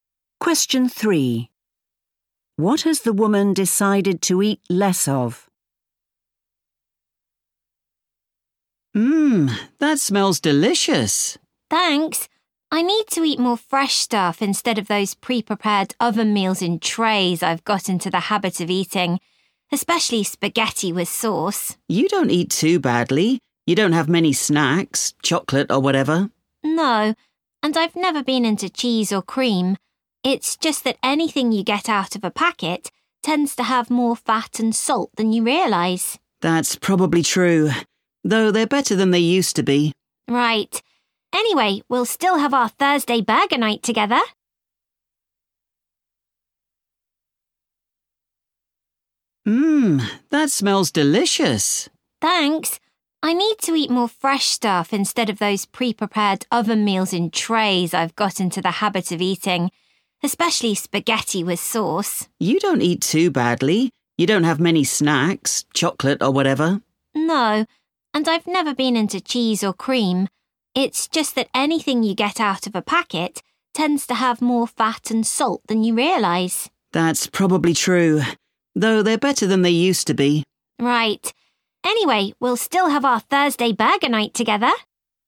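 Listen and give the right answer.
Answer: Pre-prepared oven meals (ready meals)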